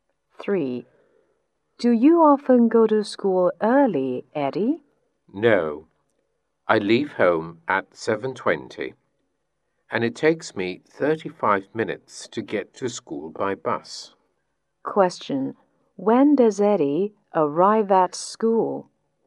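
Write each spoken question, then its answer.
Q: Question. When does Eddie arrive at school?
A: At 7:55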